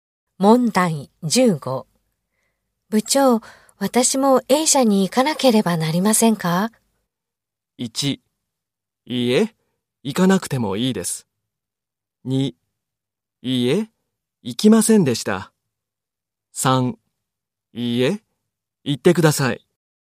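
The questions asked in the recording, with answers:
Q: 部長、私も A 社に行かなければなりませんか?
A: 1: いいえ、行かなくてもいいです。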